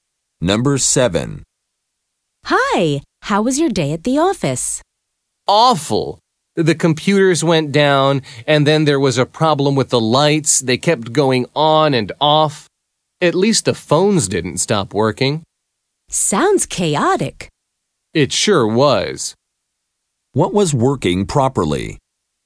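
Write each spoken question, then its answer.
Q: What was working properly?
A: The phones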